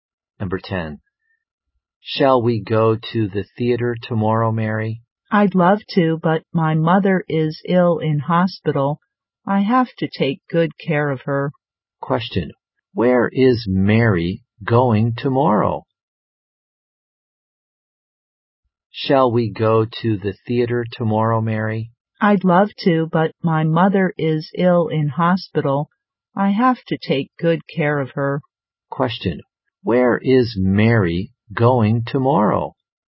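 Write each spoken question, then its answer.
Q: Question, where is Mary going tomorrow?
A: To the hospital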